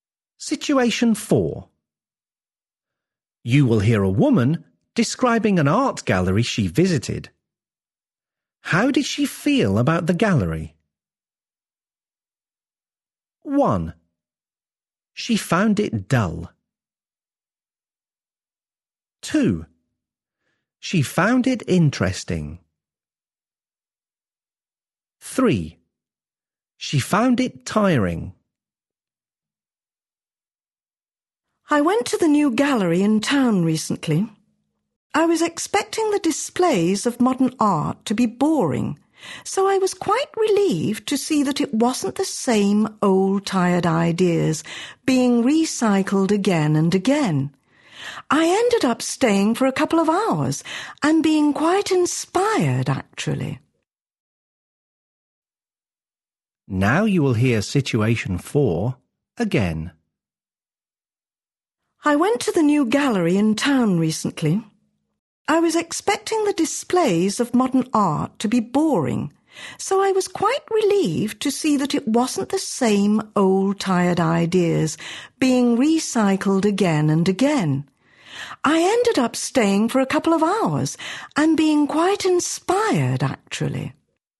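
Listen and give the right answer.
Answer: 2: She found it interesting.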